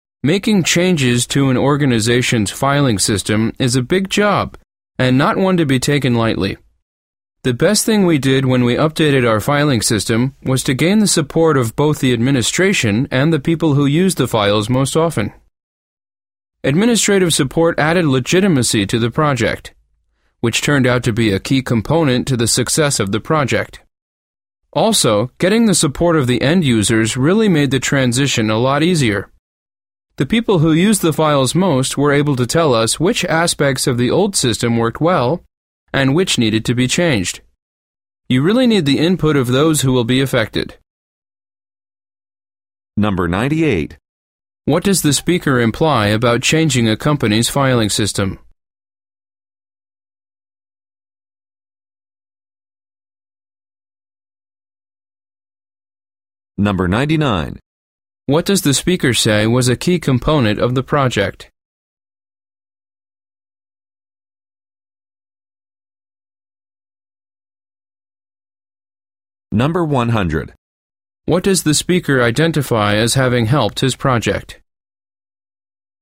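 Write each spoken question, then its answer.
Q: What does the speaker imply about changing a company's filing system?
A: It is a big job that should not be taken lightly

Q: What does the speaker say was a key component of the project?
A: Administrative support, which added legitimacy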